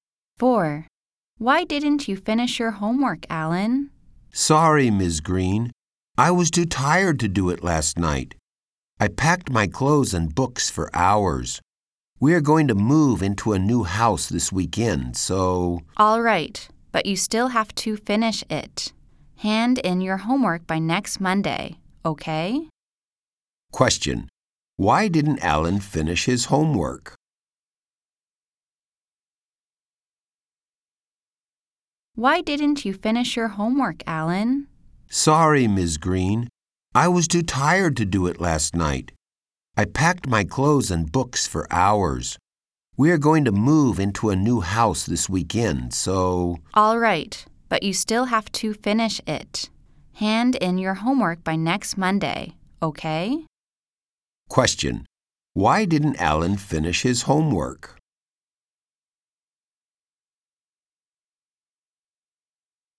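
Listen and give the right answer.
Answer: He was too tired from packing for hours to move house.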